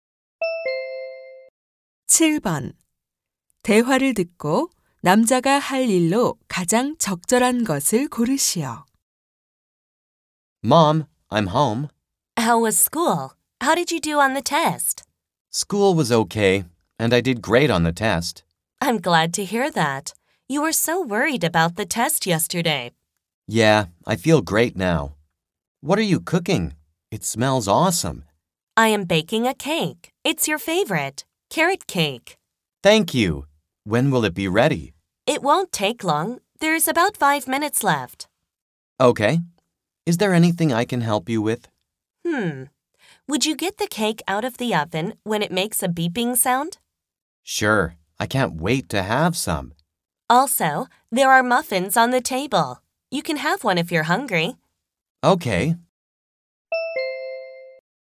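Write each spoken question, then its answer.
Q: 대화를 듣고 남자가 할 일로 가장 적절한 것을 고르시오.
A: 오븐에서 케이크 꺼내기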